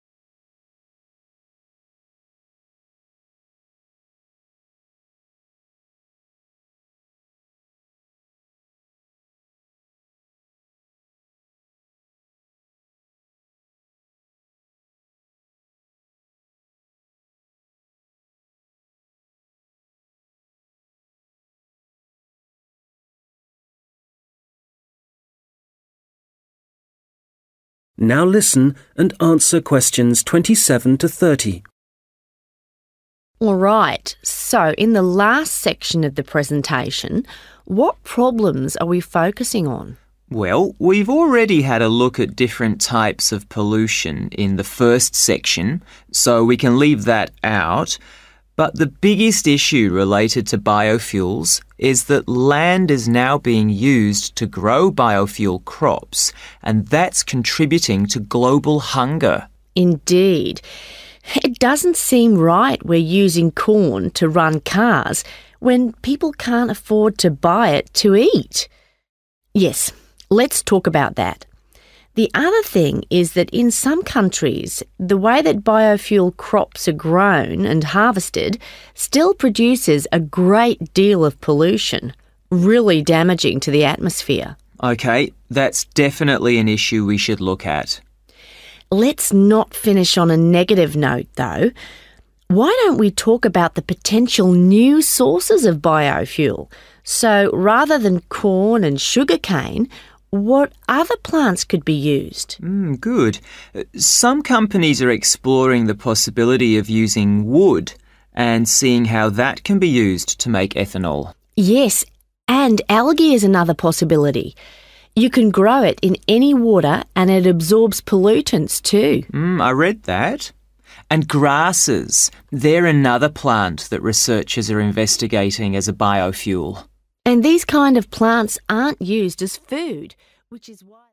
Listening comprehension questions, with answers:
Questions 27-30 Answer the questions below. Write NO MORE THAN TWO WORDS for each answer.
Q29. Which two sources of biofuel do Mike and Karina say are being tried out?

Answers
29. wood

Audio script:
Karina: Alright, so in the last section of the presentation, what problems are we focusing on?
Mike: Well, we've already had a look at different types of pollution in the first section, so we can leave that out, (Q27) but the biggest issue related to biofuels (= biofuel-related problems) is that land is now being used to grow biofuels crops – and that's contributing to global hunger.
Karina: Indeed. It doesn't seem right we're using corn to run cars when people can't afford to buy it to eat. Yes, let's talk about that. (Q28) The other thing (= The other problem) is that in some countries, the way that biofuel crops are grown and harvested still produces a great deal of pollution – really damaging to the atmosphere.
Mike: OK, that's definitely an issue we should look at.
Karina: Let's not finish on a negative note, though. Why don't we talk about the potential new sources of biofuel – so rather than corn and sugarcane – what other plants could be used?
Mike: Good. (Q29) Some companies are exploring the possibility of (= tried out) using wood, and seeing how that can be used to make ethanol.
Karina: Yes, and algae is another possibility. You can grow it in any water and it absorbs pollutants, too.
Mike: (Q30) I read that. And grasses. They're another plant that researchers are investigating (= tried out) as a biofuel.